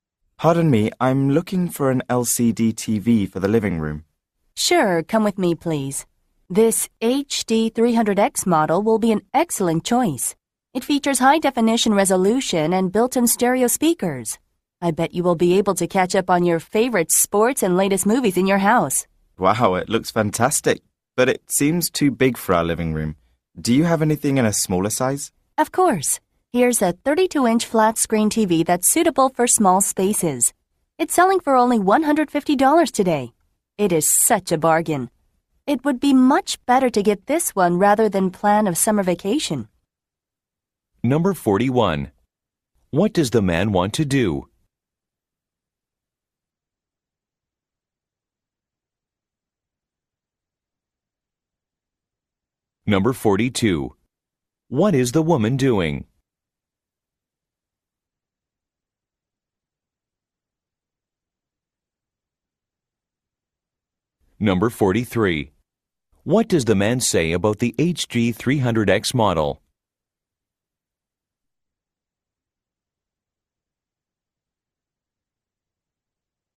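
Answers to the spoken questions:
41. Buy an LCD TV for his living room
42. Helping a customer choose a TV (selling TVs)
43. It seems too big for his living room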